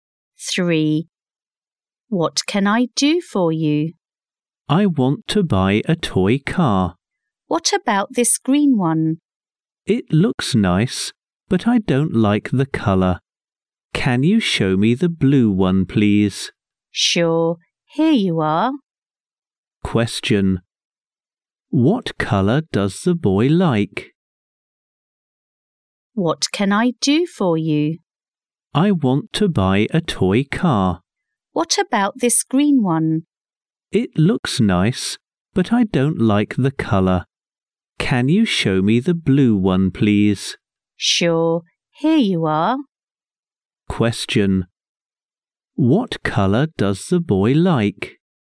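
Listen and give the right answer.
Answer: Blue.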